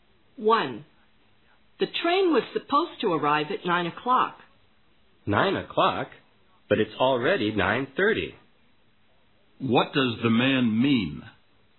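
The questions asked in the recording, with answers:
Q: What does the man mean?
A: The train is late.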